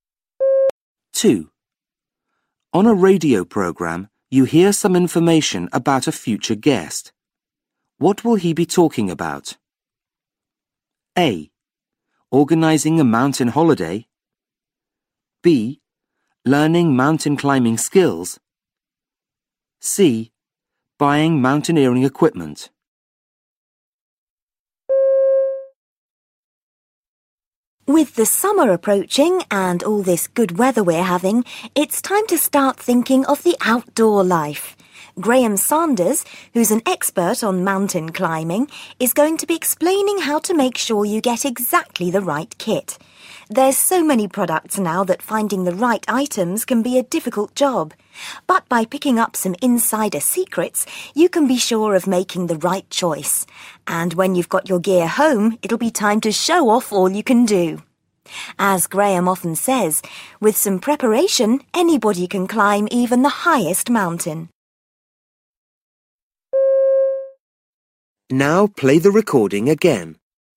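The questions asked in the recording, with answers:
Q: What will he be talking about?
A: C: Buying mountaineering equipment.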